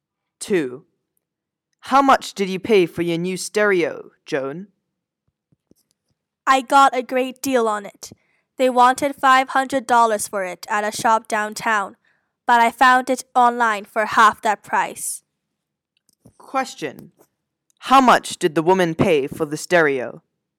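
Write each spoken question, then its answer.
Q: How much did the woman pay for the stereo?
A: $250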